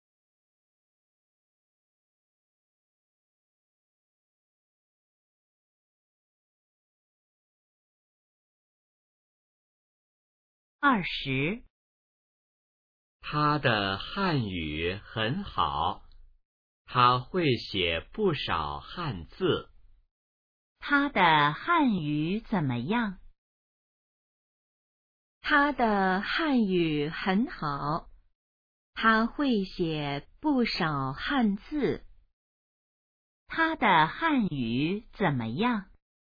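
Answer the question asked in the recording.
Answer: 很好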